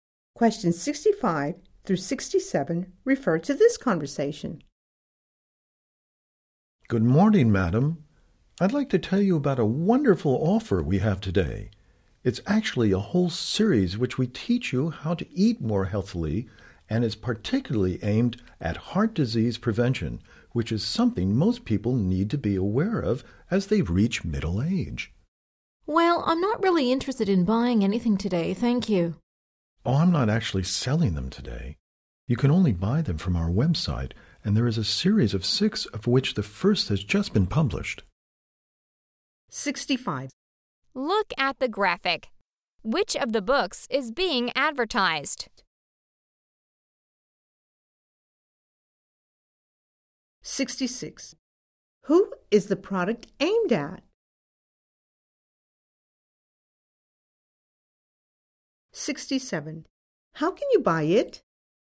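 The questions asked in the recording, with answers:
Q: Who is the product aimed at?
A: Middle-aged people

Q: How can you buy it?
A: From their website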